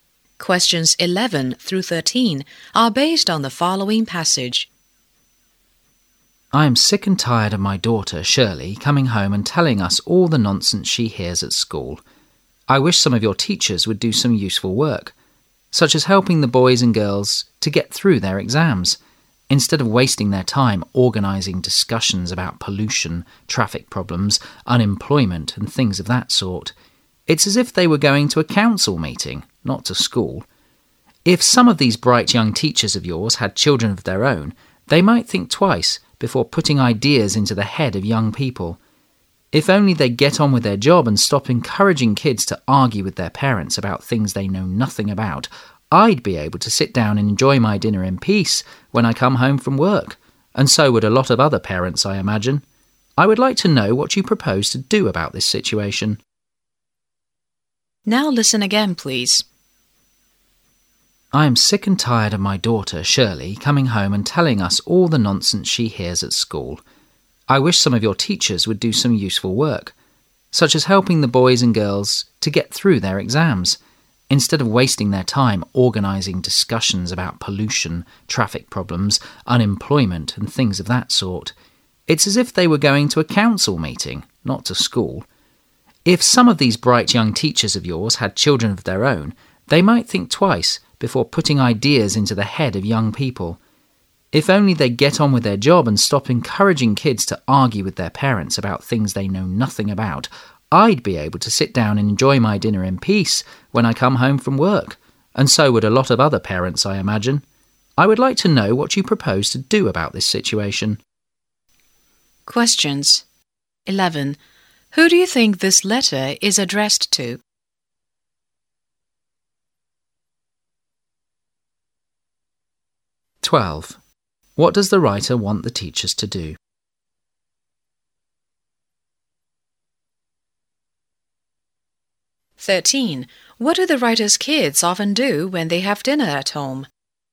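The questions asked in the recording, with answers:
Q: What does the writer want the teachers to do?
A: Help the students get through their exams

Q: What do the writer's kids often do when they have dinner at home?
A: Argue with their parents about what they discussed at school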